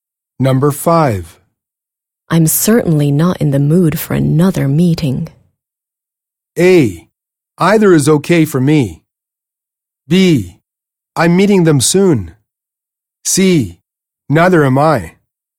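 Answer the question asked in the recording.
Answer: C: Neither am I.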